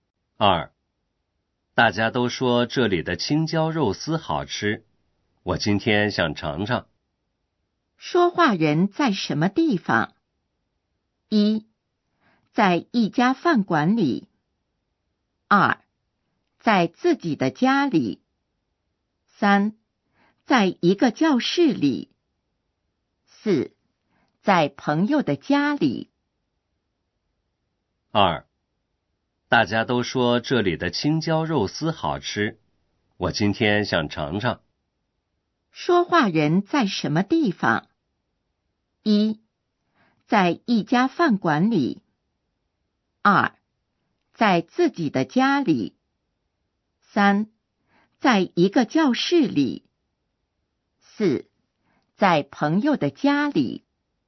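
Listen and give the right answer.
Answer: 一: 在一家饭馆里。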